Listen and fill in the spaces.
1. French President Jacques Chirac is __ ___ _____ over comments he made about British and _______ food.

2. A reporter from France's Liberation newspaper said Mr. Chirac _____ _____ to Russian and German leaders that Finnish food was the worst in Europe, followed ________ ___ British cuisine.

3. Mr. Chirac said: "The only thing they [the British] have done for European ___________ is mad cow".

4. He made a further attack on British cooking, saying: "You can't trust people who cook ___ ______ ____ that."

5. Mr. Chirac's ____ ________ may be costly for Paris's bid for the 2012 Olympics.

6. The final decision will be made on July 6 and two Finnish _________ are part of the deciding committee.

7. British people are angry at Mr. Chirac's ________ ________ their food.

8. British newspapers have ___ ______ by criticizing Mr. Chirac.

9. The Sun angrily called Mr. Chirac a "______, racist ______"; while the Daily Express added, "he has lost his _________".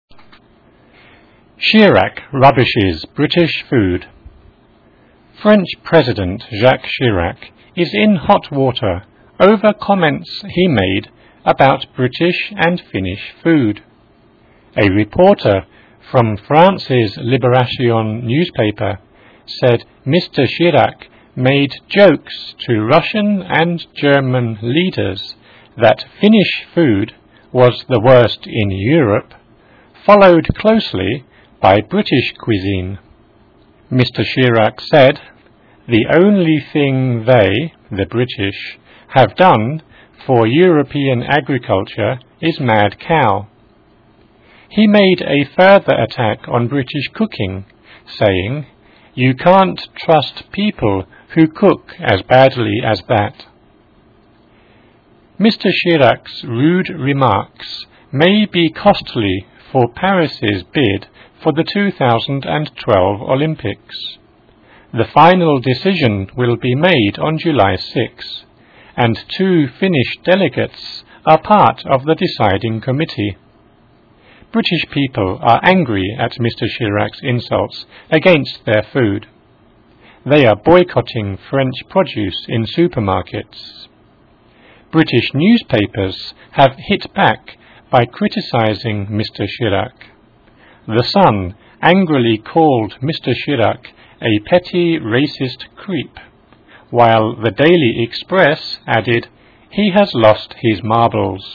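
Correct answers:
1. in hot water; Finnish
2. made jokes; closely by
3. agriculture
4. as badly as
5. rude remarks
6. delegates
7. insults against
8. hit back
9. petty; creep; marbles

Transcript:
Chirac rubbishes British food
French President Jacques Chirac is in hot water over remarks / comments / comets he made about British and Finnish food. A reporter from France's "Liberation" newspaper said Mr. Chirac made / cracked / joked jokes to Russian and German leaders that Finnish food was the worst in Europe, followed next / closely / nearly by British cuisine. Mr. Chirac said: "The only thing they [the British] have done for European agriculture is mad cow". He made a further attack / criticism / rubbish on British cooking, saying: "You can't trust people who cook as badly as that."
Mr. Chirac's rude remarks may be damaging / costly / pricey for Paris's bid for the 2012 Olympics. The final decision will be made on July 6 and two Finnish delegates / representatives / delegations are part of the deciding committee. 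British people are furious / fury / angry at Mr. Chirac's insults / criticisms / recipes against their food. They are boycotting French produce in supermarkets. British newspapers have hit back by criticizing Mr. Chirac. "The Sun" angrily called Mr. Chirac a "petty, racist creep"; while the "Daily Express" added, "he has lost his marbles / sense / book".

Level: Easier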